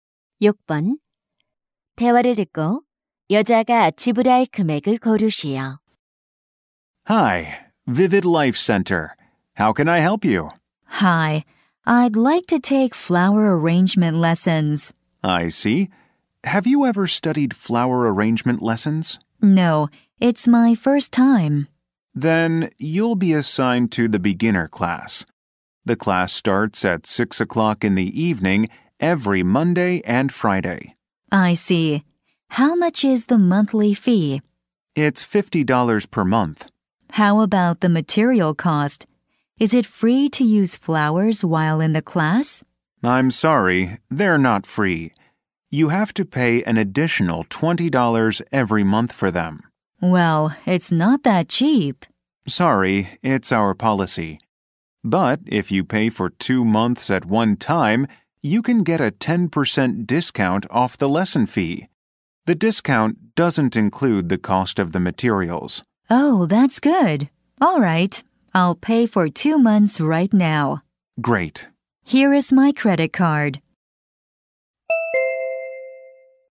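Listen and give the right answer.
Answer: 130달러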